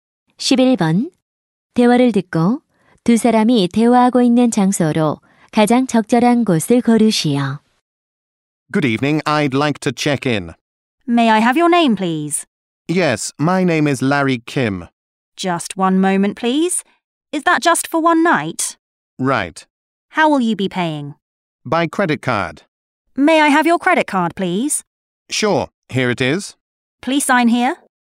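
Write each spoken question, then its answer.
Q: 대화를 듣고 두 사람이 대화하고 있는 장소로 가장 적절한 곳을 고르시오.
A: 호텔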